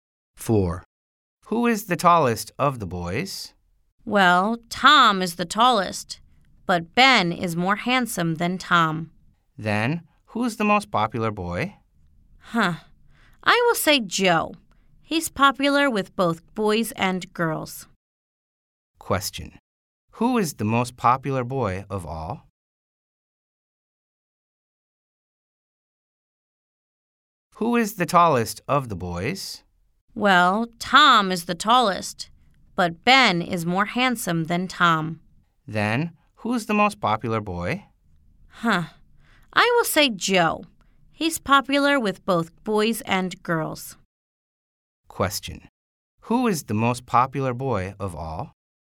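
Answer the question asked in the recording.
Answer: Joe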